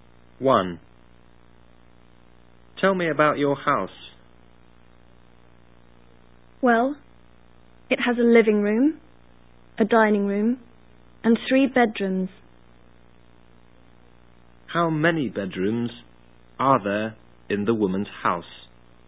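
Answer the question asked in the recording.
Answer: Three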